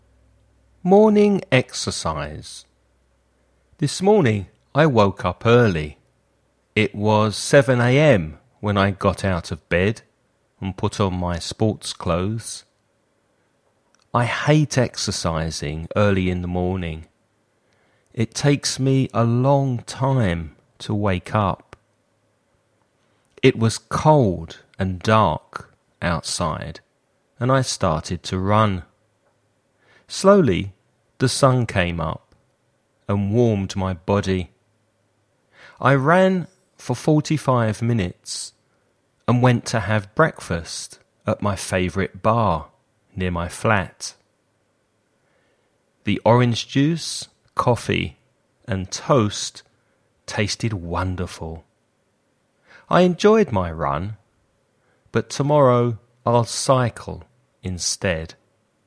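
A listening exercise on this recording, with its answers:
Escucha y contesta las siguientes preguntas.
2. What was the weather like?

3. How long did the man run for?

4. What did he have for breakfast?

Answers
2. Cold and dark
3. 45 minutes
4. Orange juice, coffee and toast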